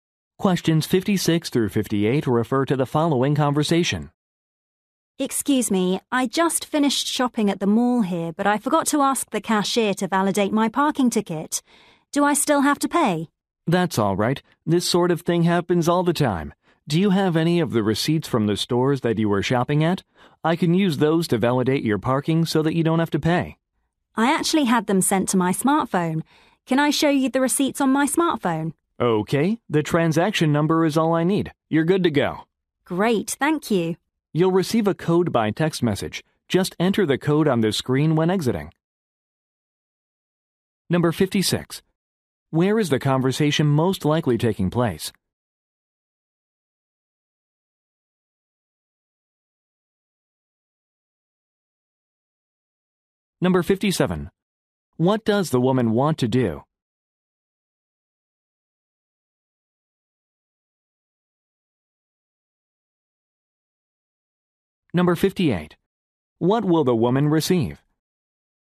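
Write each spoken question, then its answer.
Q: Where is the conversation most likely taking place?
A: At a shopping mall parking facility

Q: What does the woman want to do?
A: Get her parking ticket validated

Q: What will the woman receive?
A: A code by text message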